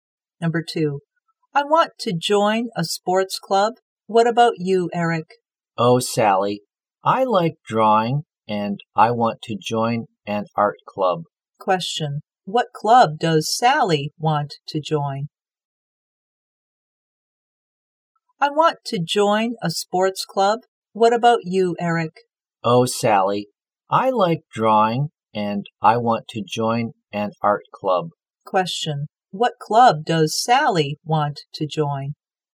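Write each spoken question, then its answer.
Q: What club does Sally want to join?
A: A sports club.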